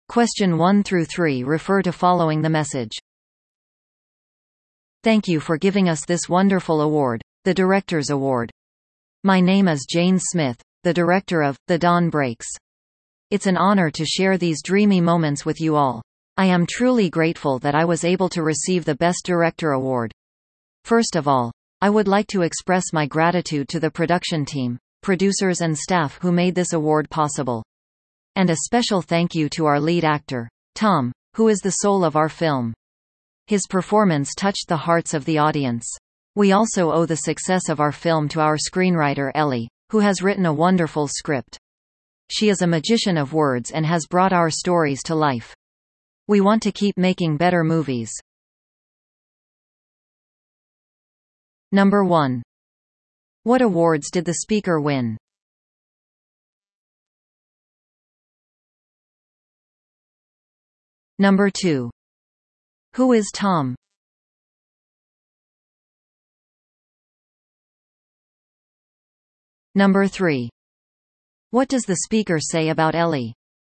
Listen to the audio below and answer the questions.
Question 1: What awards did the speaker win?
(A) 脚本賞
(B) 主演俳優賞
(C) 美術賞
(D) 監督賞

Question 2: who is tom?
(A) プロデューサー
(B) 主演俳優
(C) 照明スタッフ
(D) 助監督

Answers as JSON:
{"1": "D", "2": "B"}

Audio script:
"Thank you for giving us this wonderful award, the Director's Award. My name is Jane Smith, the director of ""The Dawn Breaks"".It's an honor to share these dreamy moments with you all. I am truly grateful that I was able to receive the Best Director Award.
First of all, I would like to express my gratitude to the production team, producers and staff who made this award possible.
And a special thank you to our lead actor, Tom, who is the soul of our film.
His performance touched the hearts of the audience.
We also owe the success of our film to our screenwriter Ellie, who has written a wonderful script.
She is a magician of words and has brought our stories to life.
We want to keep making better movies."

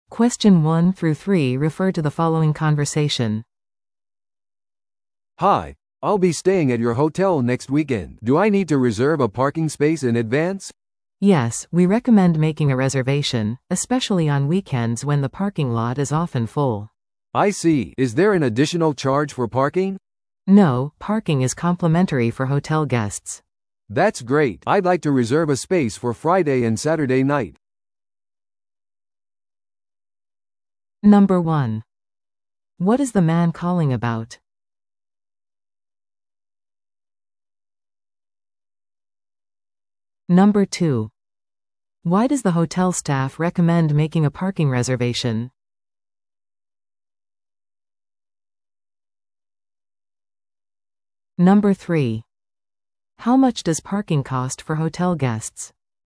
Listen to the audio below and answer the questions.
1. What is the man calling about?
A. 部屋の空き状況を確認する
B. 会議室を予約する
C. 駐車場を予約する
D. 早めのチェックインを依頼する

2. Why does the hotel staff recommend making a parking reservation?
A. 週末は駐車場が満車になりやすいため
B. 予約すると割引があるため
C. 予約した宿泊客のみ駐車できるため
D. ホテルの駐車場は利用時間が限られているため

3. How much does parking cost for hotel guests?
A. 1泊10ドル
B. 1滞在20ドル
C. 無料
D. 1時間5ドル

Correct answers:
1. C
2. A
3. C

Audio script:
Hotel parking reservation
A: "Hi, I'll be staying at your hotel next weekend. Do I need to reserve a parking space in advance?"
B: "Yes, we recommend making a reservation, especially on weekends when the parking lot is often full."
A: "I see. Is there an additional charge for parking?"
B: "No, parking is complimentary for hotel guests."
A: "That's great. I'd like to reserve a space for Friday and Saturday night."

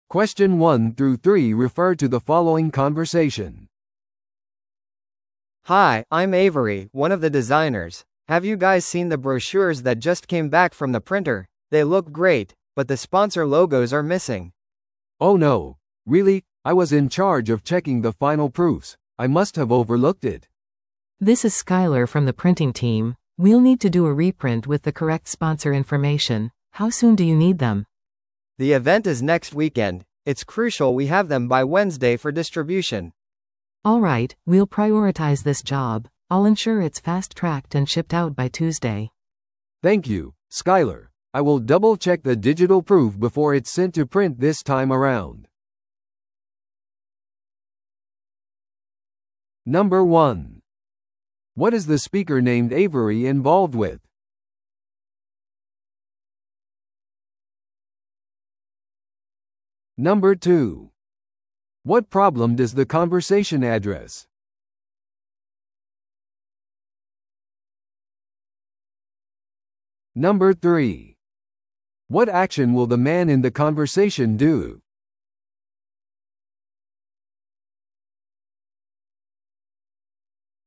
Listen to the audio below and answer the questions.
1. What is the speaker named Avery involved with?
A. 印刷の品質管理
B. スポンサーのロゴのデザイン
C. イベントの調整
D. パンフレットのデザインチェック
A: D

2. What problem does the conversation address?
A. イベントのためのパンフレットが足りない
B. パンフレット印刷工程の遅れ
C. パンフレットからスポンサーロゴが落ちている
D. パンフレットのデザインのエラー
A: C

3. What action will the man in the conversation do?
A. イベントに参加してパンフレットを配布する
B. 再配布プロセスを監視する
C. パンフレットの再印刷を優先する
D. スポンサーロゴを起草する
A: C

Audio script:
B: Hi, I'm Avery, one of the designers. Have you guys seen the brochures that just came back from the printer? They look great, but the sponsor logos are missing.
C: Oh no, really? I was in charge of checking the final proofs. I must have overlooked it.
A: This is Skyler from the printing team. We'll need to do a reprint with the correct sponsor information. How soon do you need them?
B: The event is next weekend. It's crucial we have them by Wednesday for distribution.
A: Alright, we'll prioritize this job. I'll ensure it's fast-tracked and shipped out by Tuesday.
C: Thank you, Skyler. I will double-check the digital proof before it's sent to print this time around.

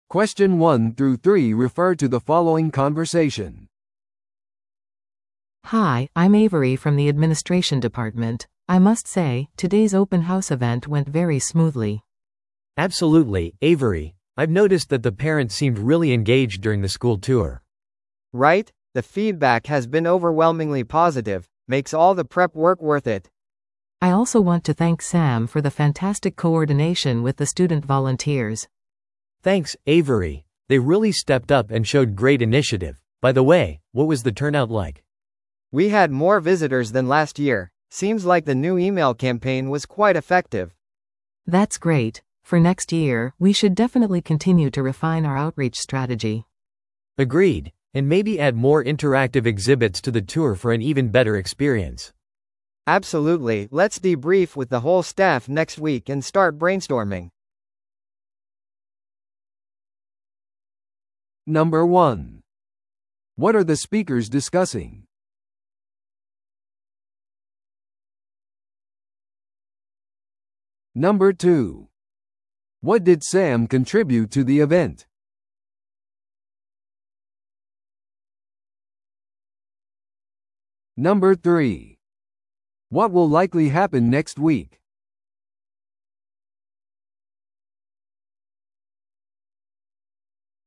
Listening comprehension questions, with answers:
Listen to the audio below and answer the questions.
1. What are the speakers discussing?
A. オープンハウスイベントの成功について。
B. 生徒ボランティアのパフォーマンスレビューについて。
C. 学校が提供する新しいコースについて。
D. 管理部が受賞した賞について。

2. What did Sam contribute to the event?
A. 新しいメールキャンペーンを運営。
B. 生徒ボランティアとの調整。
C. アウトリーチ戦略を洗練させる。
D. ケータリングサービスを担当。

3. What will likely happen next week?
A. スタッフがパーティーで祝う。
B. 全スタッフで反省会が行われる。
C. サムが新しいメールキャンペーンを開始。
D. エイヴリーがボランティアの面接を実施。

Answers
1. A
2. B
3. B

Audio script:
A: Hi, I'm Avery from the administration department. I must say, today's open house event went very smoothly.
B: Absolutely, Avery. I've noticed that the parents seemed really engaged during the school tour.
C: Right? The feedback has been overwhelmingly positive. Makes all the prep work worth it!
A: I also want to thank Sam for the fantastic coordination with the student volunteers.
B: Thanks, Avery. They really stepped up and showed great initiative. By the way, what was the turnout like?
C: We had more visitors than last year. Seems like the new email campaign was quite effective.
A: That's great. For next year, we should definitely continue to refine our outreach strategy.
B: Agreed. And maybe add more interactive exhibits to the tour for an even better experience.
C: Absolutely, let's debrief with the whole staff next week and start brainstorming.

